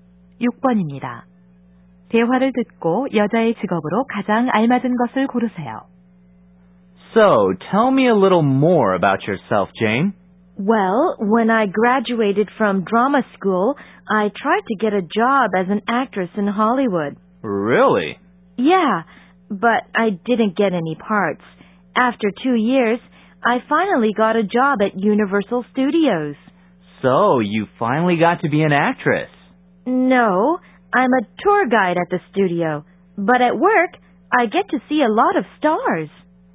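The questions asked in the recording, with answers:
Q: 대화를 듣고 여자의 직업으로 가장 알맞은 것을 고르세요.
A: 스튜디오 관광 가이드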